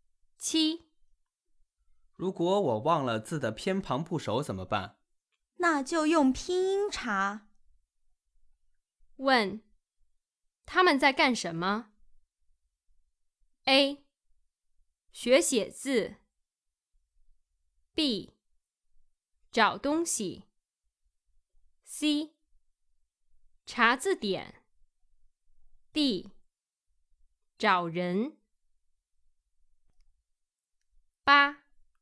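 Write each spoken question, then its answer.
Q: 问,他们在干什么? A. 学写字 B. 找东西 C. 查字典 D. 找人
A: C: 查字典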